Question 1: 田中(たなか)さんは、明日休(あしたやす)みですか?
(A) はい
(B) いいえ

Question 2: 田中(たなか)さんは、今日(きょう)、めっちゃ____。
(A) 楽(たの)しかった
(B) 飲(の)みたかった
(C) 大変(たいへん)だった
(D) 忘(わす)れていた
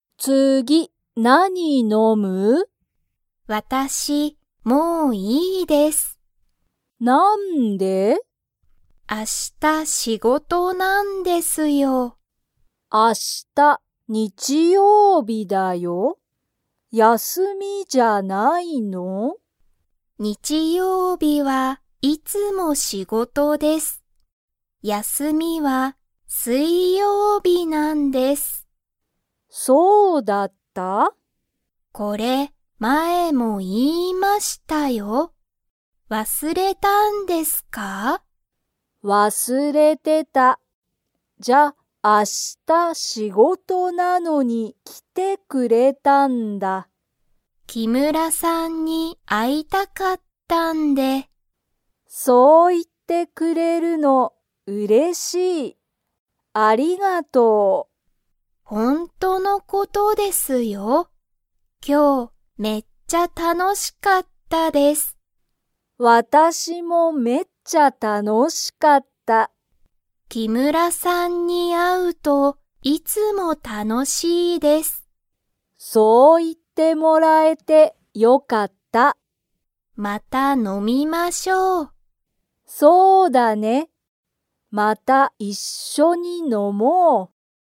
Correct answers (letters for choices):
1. B
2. A

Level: Level 2